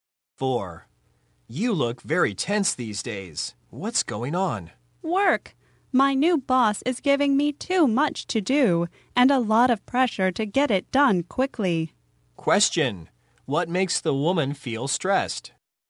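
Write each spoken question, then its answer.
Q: What makes the woman feel stressed?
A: Her new boss gives her too much work and pressure.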